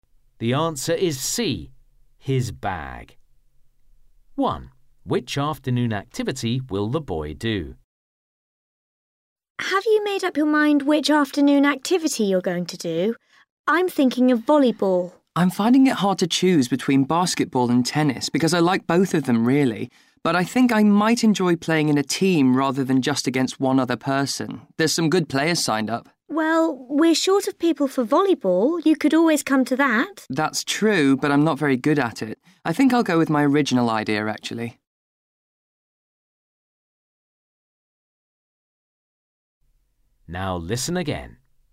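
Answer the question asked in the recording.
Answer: basketball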